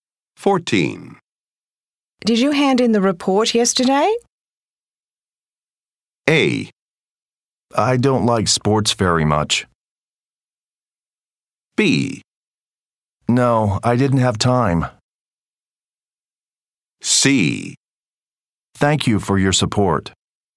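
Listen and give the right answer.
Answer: B: No, I didn't have time.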